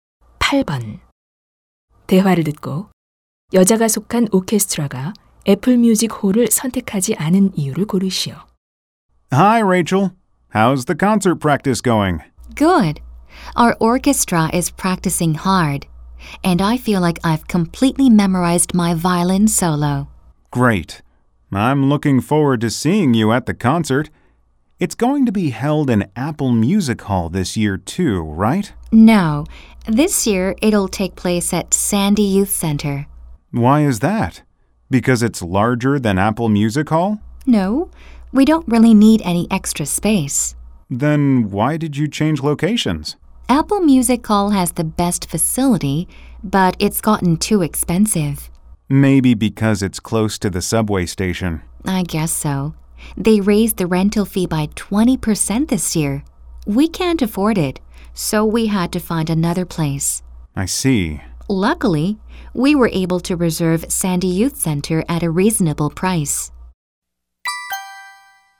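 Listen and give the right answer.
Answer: 대관료가 너무 비싸져서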